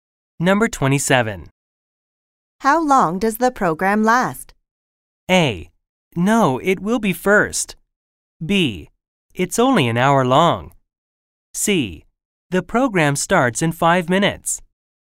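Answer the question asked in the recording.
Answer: B: It's only an hour long.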